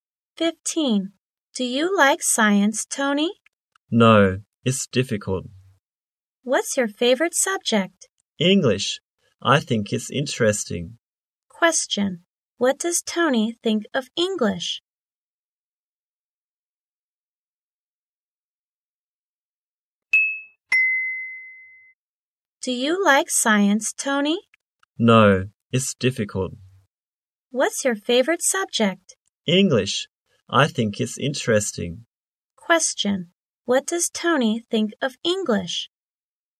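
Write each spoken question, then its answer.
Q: What does Tony think of English?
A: It's interesting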